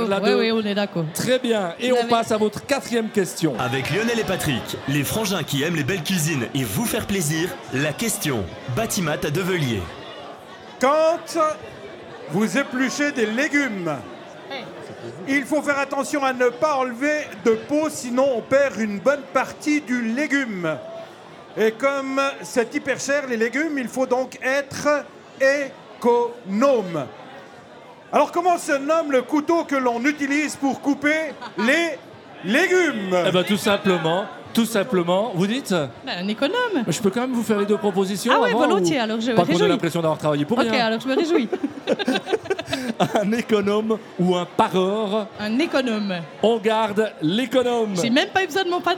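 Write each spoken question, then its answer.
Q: Alors comment se nomme le couteau que l'on utilise pour couper les légumes ?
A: un économe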